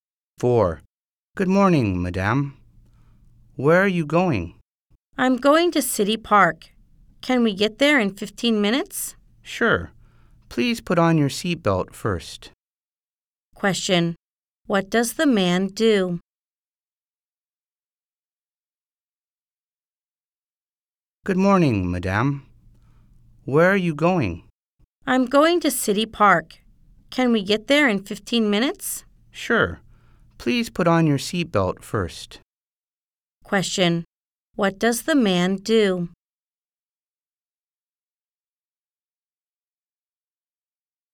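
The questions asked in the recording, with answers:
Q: Question. What does the man do?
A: He is a taxi driver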